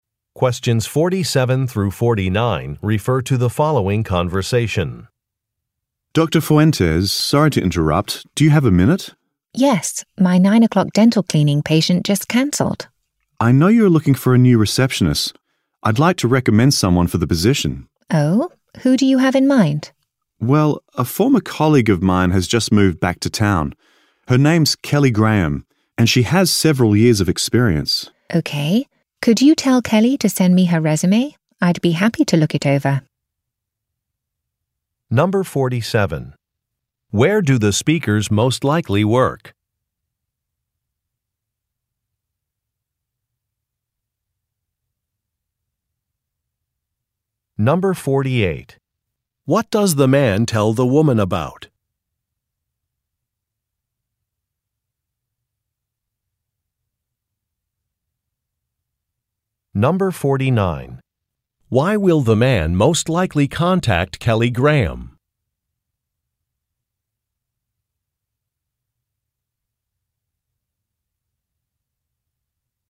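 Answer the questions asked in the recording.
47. At a dental office
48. A former colleague who could be the new receptionist
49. To ask her to send her resume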